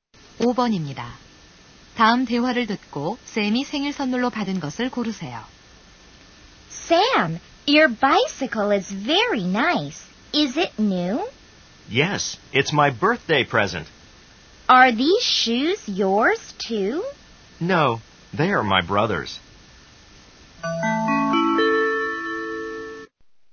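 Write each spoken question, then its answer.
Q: 다음 대화를 듣고 샘이 생일 선물로 받은 것을 고르세요.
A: 자전거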